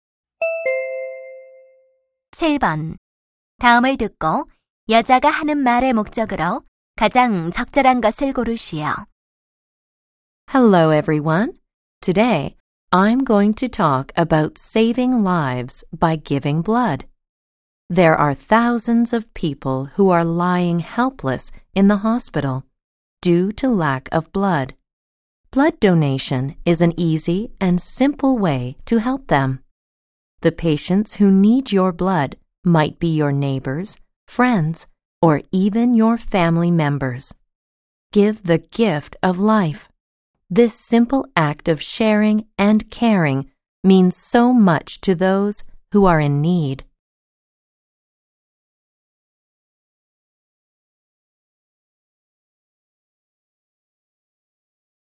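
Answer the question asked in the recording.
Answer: 헌혈을 권장하려고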